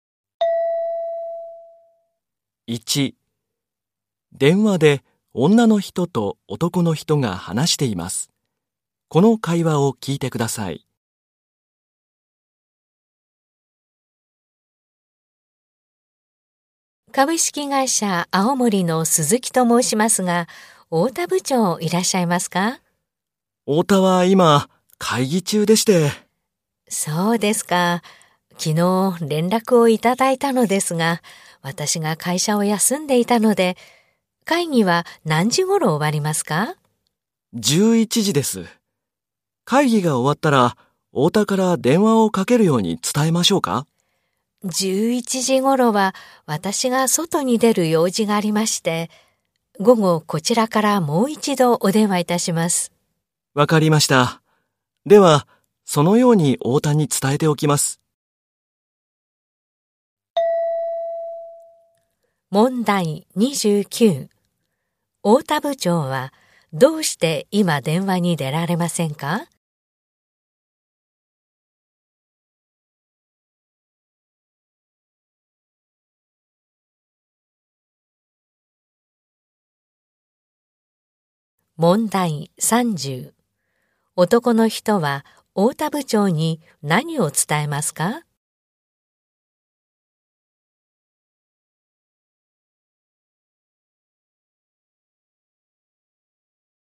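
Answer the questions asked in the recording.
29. 会議中だから
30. 午後女の人がもう一度電話すること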